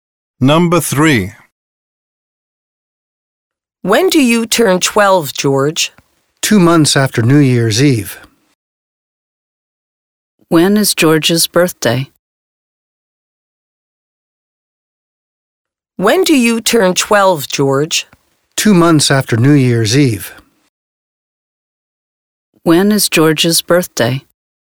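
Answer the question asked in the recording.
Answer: In March (2 months after New Year's Eve)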